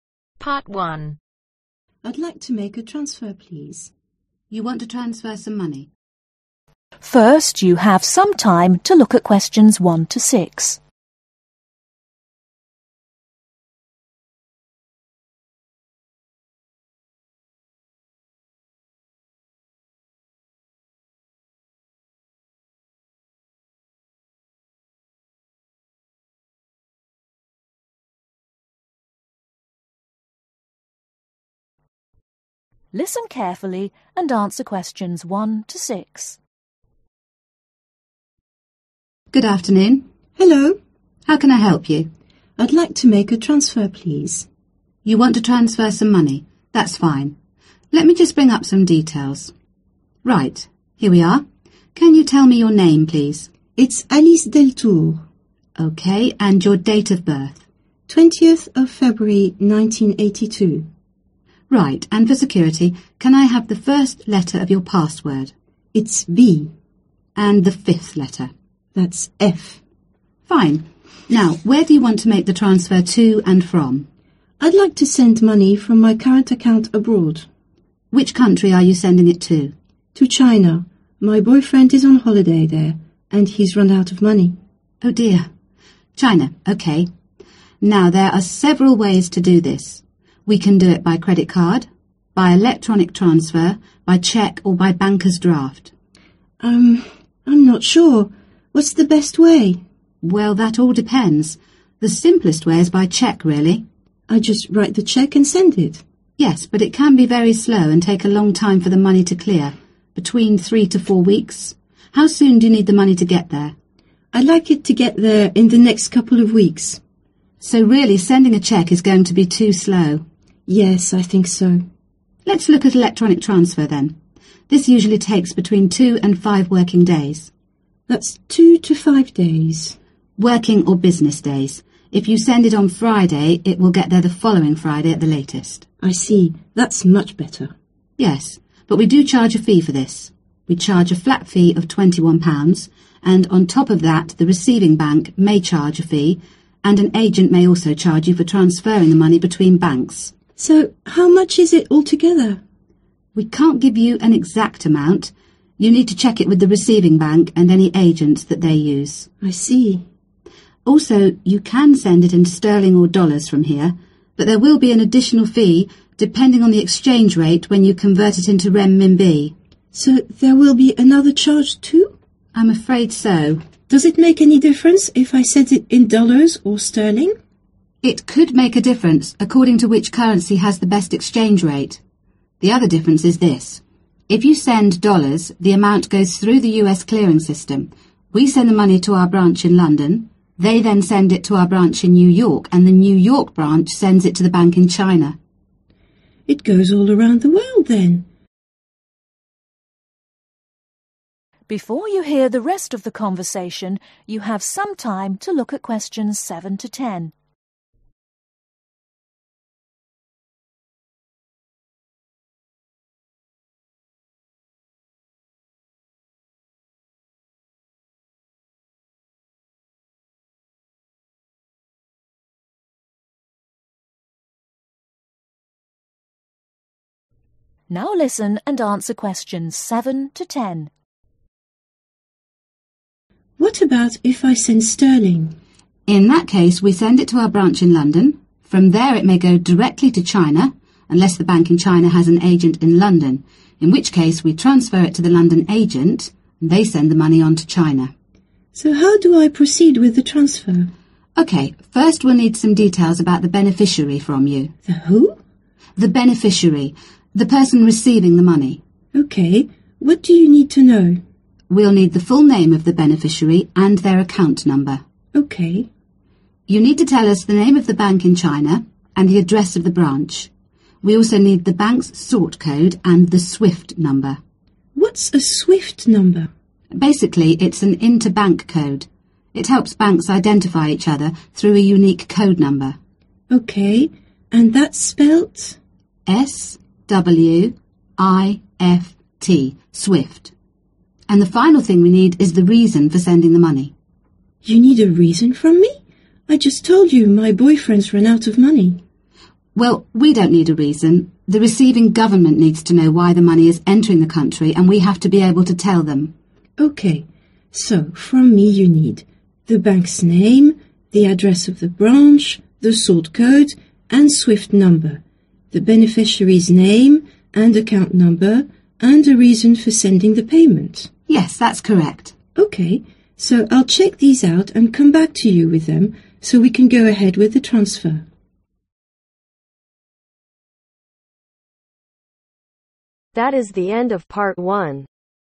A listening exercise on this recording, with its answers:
Complete the notes below. Write ONE WORD OR A NUMBER for each answer.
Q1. Cheque 3 to (1) .............. weeks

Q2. Electronically 2 to 5 (2) .............. days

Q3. Changes from (3) .............. bank, (4) .............. bank, (5) charges for transferring amount, and additional fee for (6) .............. .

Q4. Changes from (3) .............. bank, (4) .............. bank, (5) charges for transferring amount, and additional fee for (6) .............. .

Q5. Changes from (3) .............. bank, (4) .............. bank, (5) charges for transferring amount, and additional fee for (6) .............. .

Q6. Changes from (3) .............. bank, (4) .............. bank, (5) charges for transferring amount, and additional fee for (6) .............. .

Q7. Full name of beneficiary and (7) ............... number.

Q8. Name of bank and the (8) ............... of the branch.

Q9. The bank's sort (9) .............. and (10) .............. number.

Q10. The bank's sort (9) .............. and (10) .............. number.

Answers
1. 4
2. WORKING
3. SENDING
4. RECEIVING
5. AGENT
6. EXCHANGE
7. ACCOUNT
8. ADDRESS
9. CODE
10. SWIFT